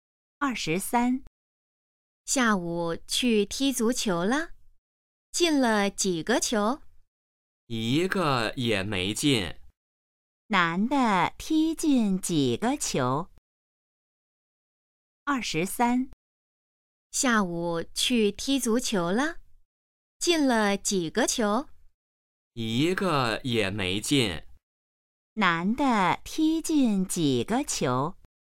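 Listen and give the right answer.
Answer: 一个也没进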